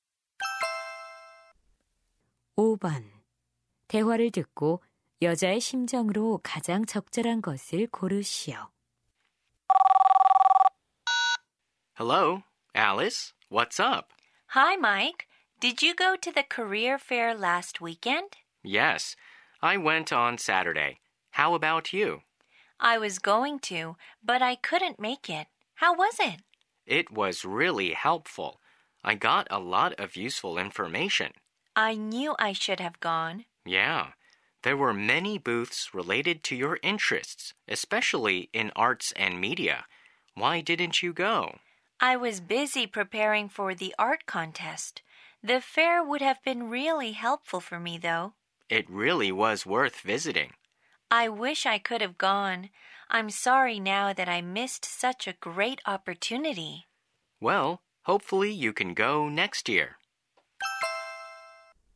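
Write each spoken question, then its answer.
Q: 대화를 듣고 여자의 심정으로 가장 적절한 것을 고르시오.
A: 후회스러움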